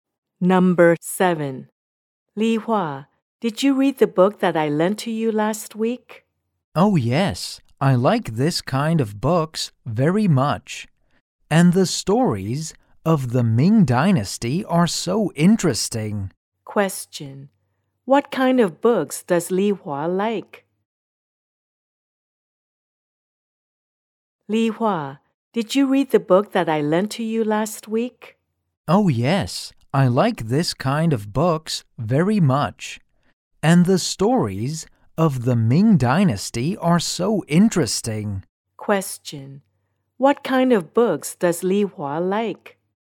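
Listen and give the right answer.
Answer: History books (stories of the Ming Dynasty)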